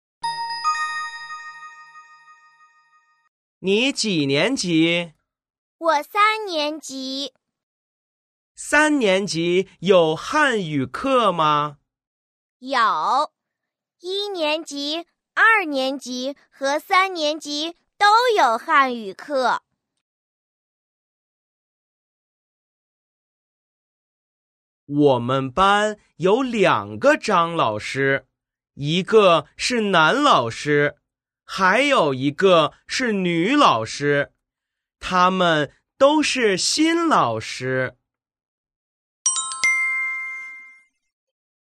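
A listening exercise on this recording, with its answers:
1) 他们班有几个张老师?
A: 两个

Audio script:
B: 🔊 有,一年级、二年级和三年级都有汉语课。
🔊 我们班有两个张老师,一个是男老师,还有一个是女老师,他们都是新老师。

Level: YCT 3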